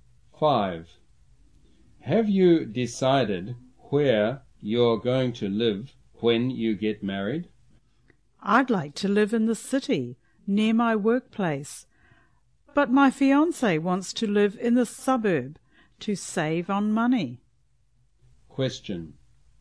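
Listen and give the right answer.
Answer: To be near her workplace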